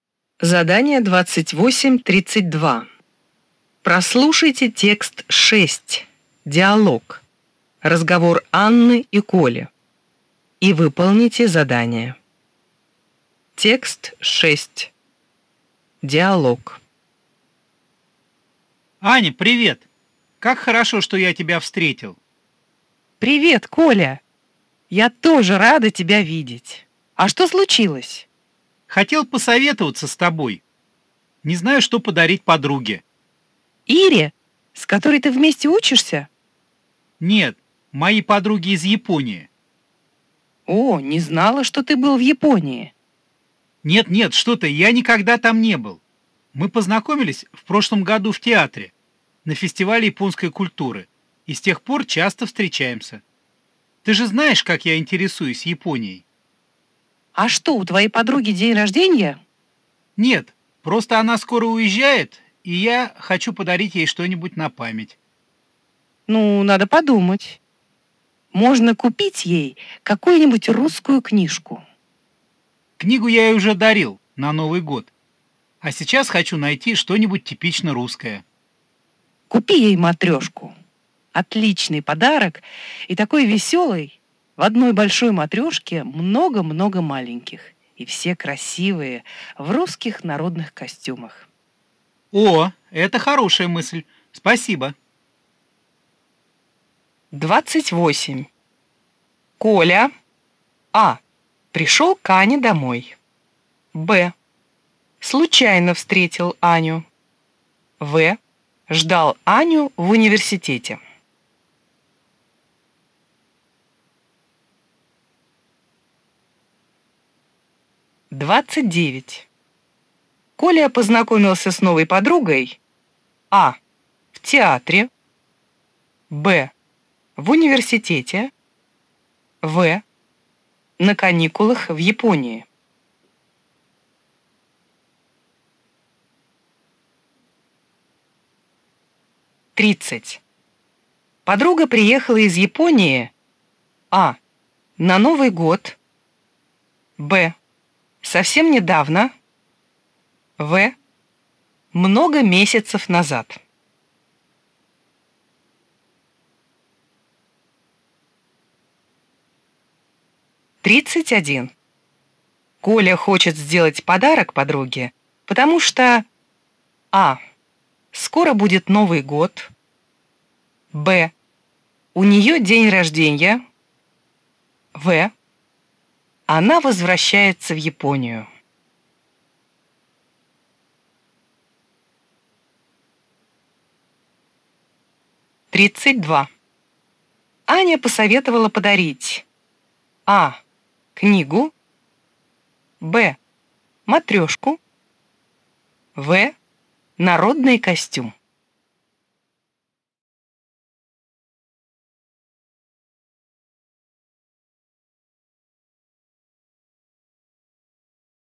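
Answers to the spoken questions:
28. Б: Случайно встретил Аню.
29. А: В театре.
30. В: Много месяцев назад.
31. В: Она возвращается в Японию.
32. Б: матрешку.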